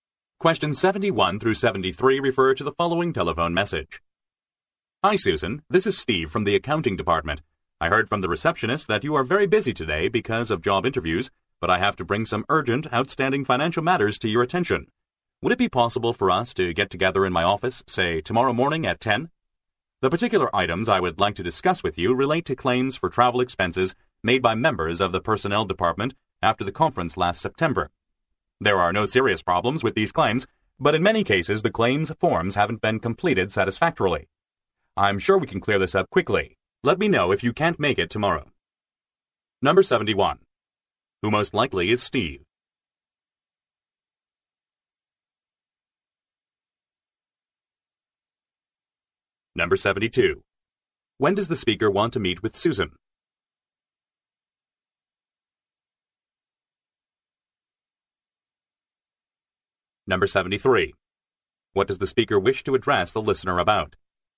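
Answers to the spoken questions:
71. An accounting department employee
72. Tomorrow morning at 10
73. Incomplete travel expense claim forms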